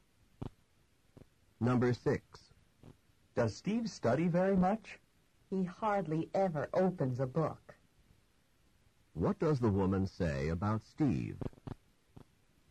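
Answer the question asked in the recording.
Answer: Steve hardly studies at all.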